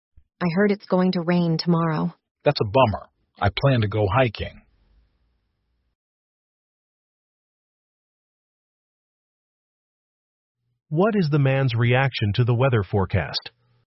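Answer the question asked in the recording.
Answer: He is disappointed because he planned to go hiking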